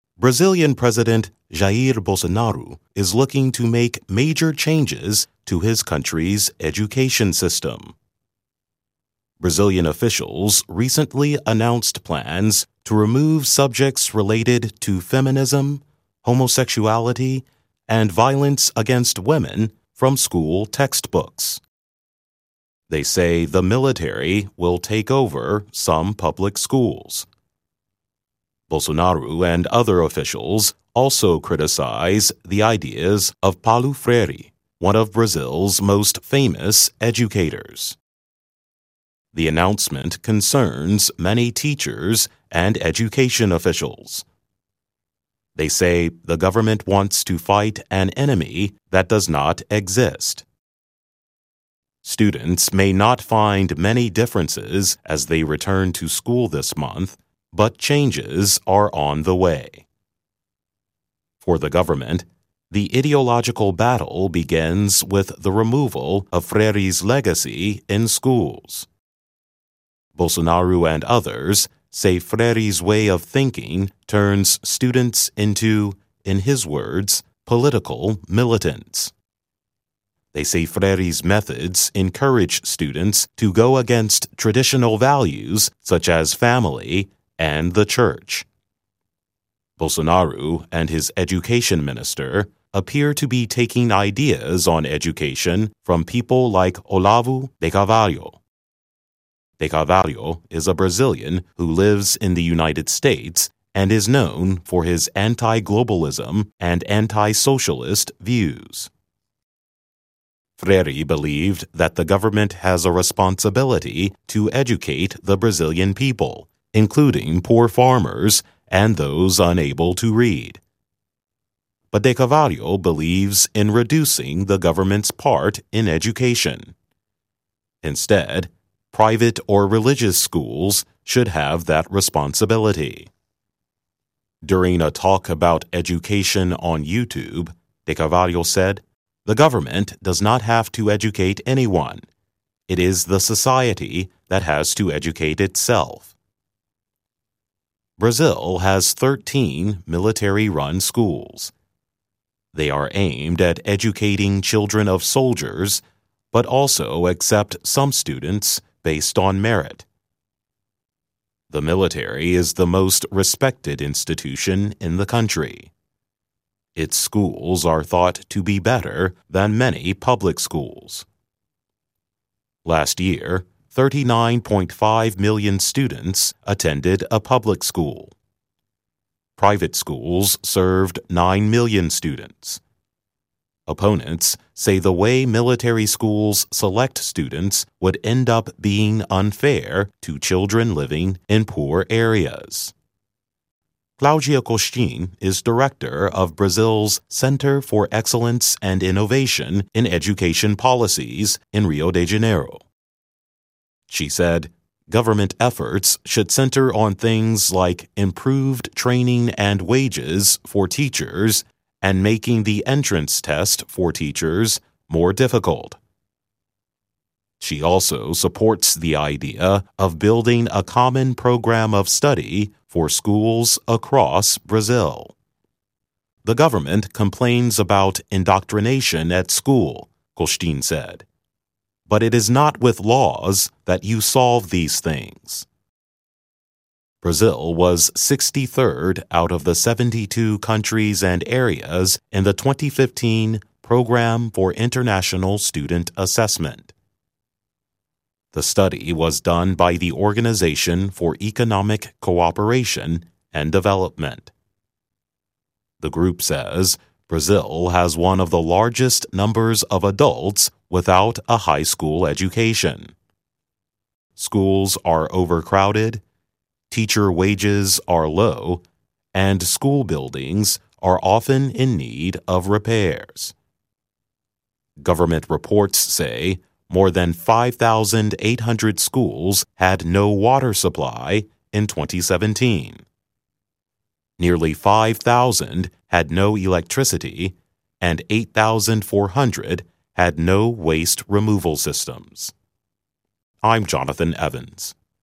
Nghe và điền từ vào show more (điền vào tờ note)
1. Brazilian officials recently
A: announced

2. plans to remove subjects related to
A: feminism

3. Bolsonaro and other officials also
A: criticize

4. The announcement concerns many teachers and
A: education

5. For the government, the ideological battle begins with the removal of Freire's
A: legacy

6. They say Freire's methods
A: encourage

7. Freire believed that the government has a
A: responsibility

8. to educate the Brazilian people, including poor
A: farmers

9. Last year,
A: 39.5 million

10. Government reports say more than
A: 5,800

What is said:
They say the government wants to fight an enemy that does not exist.
Students may not find many differences as they return to school this month, but changes are on the way.
Bolsonaro and others say Freire's way of thinking turns students into, in his words, "political militants."
They say Freire's methods [bg_collapse view="button-orange" color="#4a4949′′ expand_text="Show More" collapse_text="Show Less" ]encourage[/bg_collapse] students to go against traditional values such as family and the church.
Bolsonaro and his education minster appear to be taking ideas on education from people like Olavo de Carvalho. De Carvalho is a Brazilian who lives in the United States and is known for his anti-globalism and anti-socialist views.
But de Carvalho believes in reducing the government's part in education. Instead, private or religious schools should have that responsibility.
During a talk about education on YouTube, de Carvalho said, "The government does not have to educate anyone; it is the society that has to educate itself."
Brazil has 13 military-run schools. They are aimed at educating children of soldiers, but also accept some students based on merit. The military is the most respected institution in the country. Its schools are thought to be better than many public schools.
Private schools served 9 million students. Opponents say the way military schools select students would end up being unfair to children living in poor areas.
Claudia Costin is director of Brazil's Center for Excellence and Innovation in Education Policies in Rio de Janeiro. She said government efforts should center on things like improved training and wages for teachers and making the entrance test for teachers more difficult. She also supports the idea of building a common program of study for schools across Brazil.
The government "complains about indoctrination at school," Costin said. "But it is not with laws that you solve these things."
Brazil was 63rd out of the 72 countries and areas in the 2015 Program for International Student Assessment. The study was done by the Organization for Economic Cooperation and Development.
The group says Brazil has one of the largest numbers of adults without a high-school education. Schools are overcrowded, teacher wages are low and school buildings are often in need of repairs.

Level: INTERMEDIATE